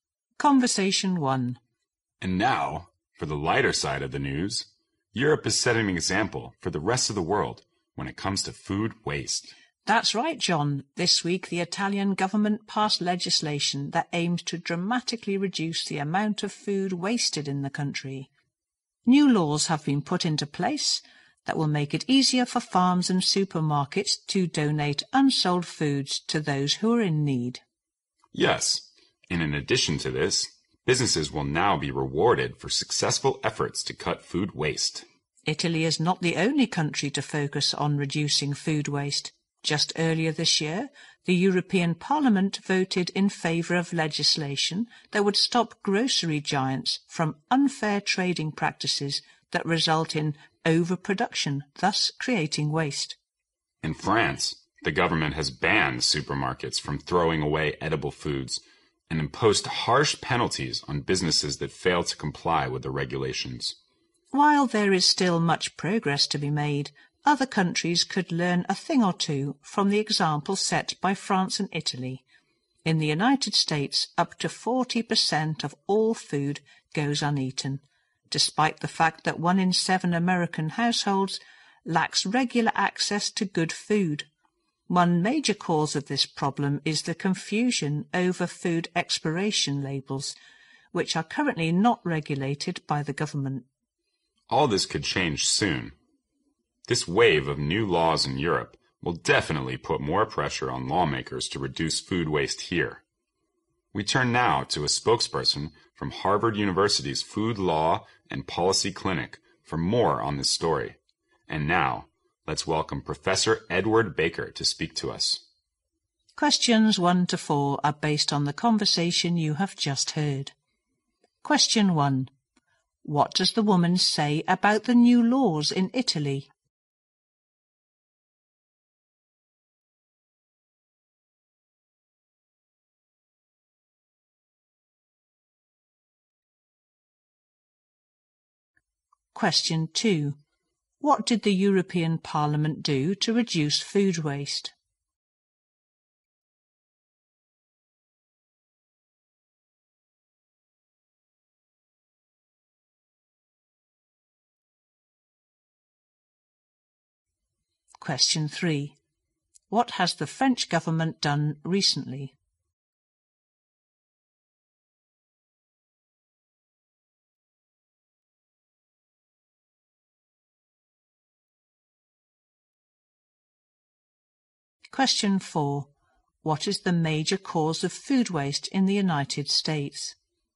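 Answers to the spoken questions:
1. They make it easier for farms and supermarkets to donate unsold food to people in need
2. It voted for legislation to stop grocery giants' unfair trading practices that cause overproduction
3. It banned supermarkets from throwing away edible food
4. Confusion over food expiration labels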